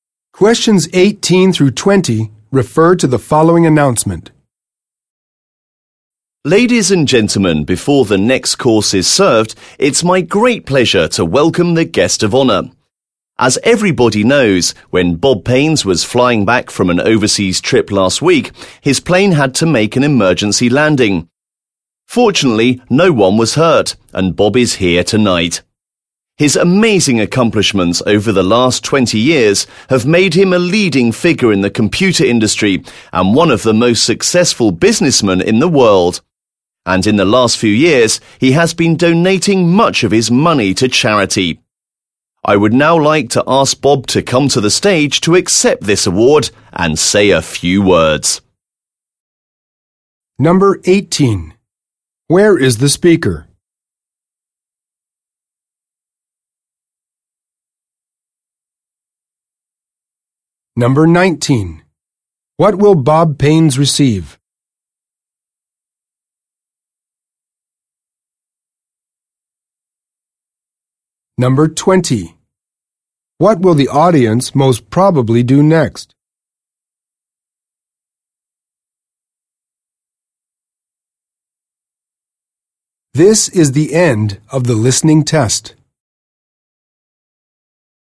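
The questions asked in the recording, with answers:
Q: Where is the speaker?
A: At a dinner

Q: What will Bob Paines receive?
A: An award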